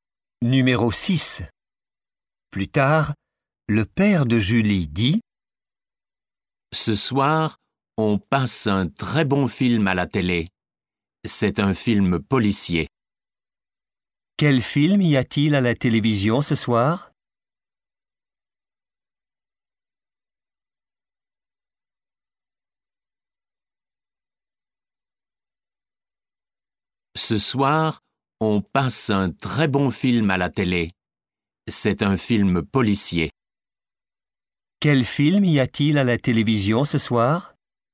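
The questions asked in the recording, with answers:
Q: Quel film y a-t-il à la télévision ce soir ?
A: Un film policier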